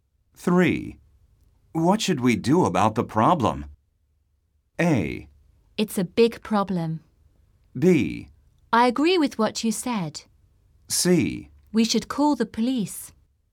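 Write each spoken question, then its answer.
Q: What should we do about the problem?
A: C: We should call the police.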